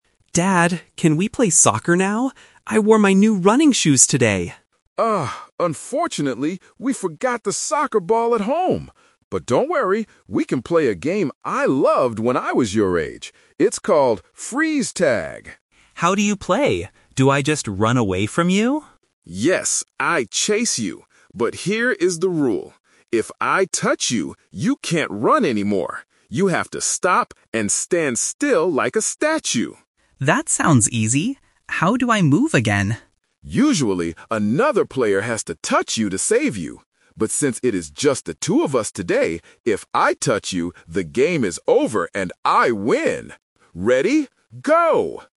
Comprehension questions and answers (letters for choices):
Listen to a father and his son talking at the park. Then, read the questions below and choose the correct answer (A, B, or C) for each question..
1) Why are they NOT playing soccer today?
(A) The boy forgot his shoes.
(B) They didn't bring a ball.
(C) The park is too crowded.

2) What must the boy do if his dad touches him during the game?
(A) He has to stop moving.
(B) He has to run faster.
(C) He has to chase his dad.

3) In a normal game of Freeze Tag, how can a "frozen" player move again?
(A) By waiting for one minute.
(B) By touching the chaser.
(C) By getting touched by another player.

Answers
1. B
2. A
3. C

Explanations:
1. The dad says, "unfortunately, we forgot the soccer ball at home!" Option (A) is a trap; the boy mentions his new shoes, but he didn't forget them (he wore them). Option (C) is a plausible reason not to play, but no one mentions the park being crowded.
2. The dad explains the rule clearly: "you can't run anymore. You have to stop and stand still like a statue." Option (B) is a trap; running is part of the game, but when touched, you must stop, not go faster. Option (C) is a plausible rule for normal "Tag," but in "Freeze Tag," the touched person freezes.
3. The dad states, "Usually, another player has to touch you to save you." Option (A) is plausible for some kids' games, but it is not mentioned in the audio. Option (B) is a trap; the chaser (the dad) is the one who freezes people, not the one who saves them.

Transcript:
Son: Dad, can we play soccer now? I wore my new running shoes today!
Dad: Oh, unfortunately, we forgot the soccer ball at home! But don't worry, we can play a game I loved when I was your age. It's called "Freeze Tag."
Son: How do you play? Do I just run away from you?
Dad: Yes, I chase you. But here is the rule: if I touch you, you can't run anymore. You have to stop and stand still like a statue.
Son: That sounds easy. How do I move again?
Dad: Usually, another player has to touch you to save you. But since it is just the two of us today, if I touch you, the game is over and I win! Ready? Go!